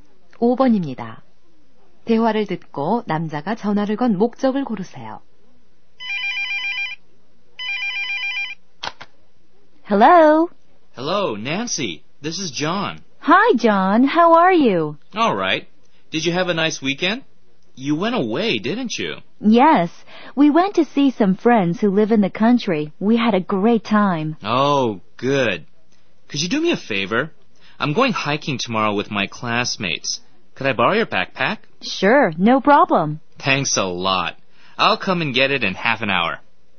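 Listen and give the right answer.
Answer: 배낭을 빌리려고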